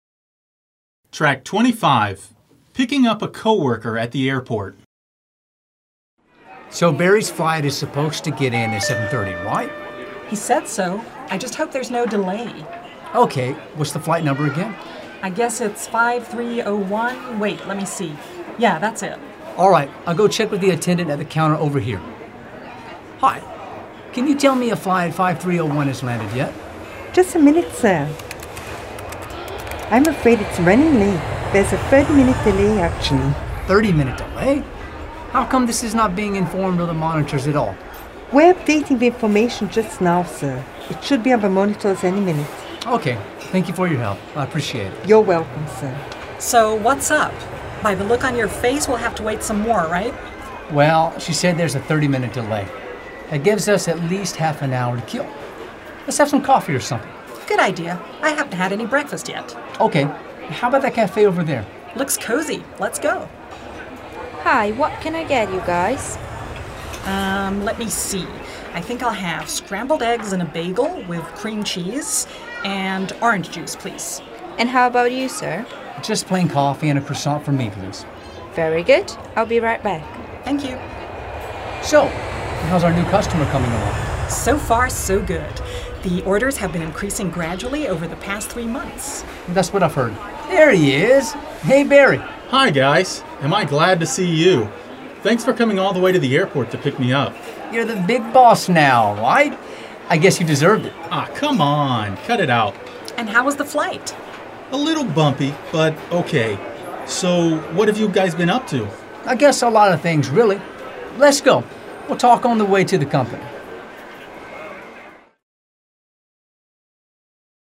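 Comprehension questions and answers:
Dialogue comprehension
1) Barry's flight is supposed to arrive on schedule.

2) Will and Melanie decide to have lunch while they wait for Barry.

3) Melanie is not hungry at all.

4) Will, Barry and Melanie are most probably co-workers.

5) Barry had a very smooth flight.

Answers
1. False
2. False
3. False
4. True
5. False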